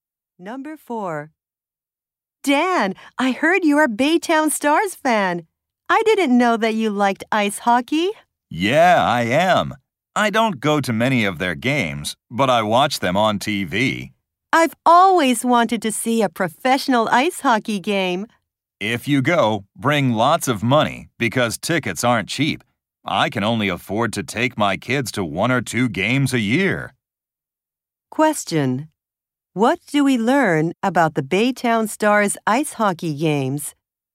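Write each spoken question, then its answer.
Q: What do we learn about the Baytown Stars ice hockey games?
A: The tickets are expensive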